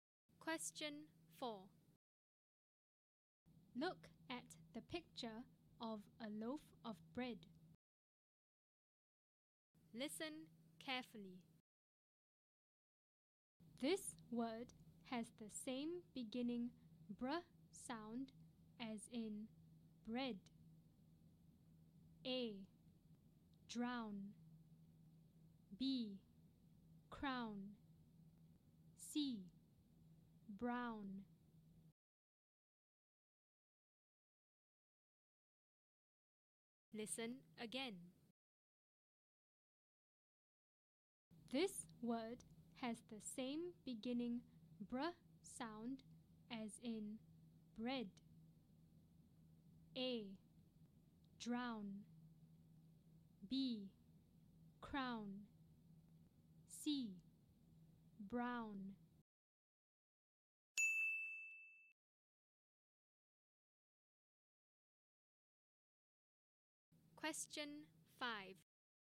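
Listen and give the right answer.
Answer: C: Brown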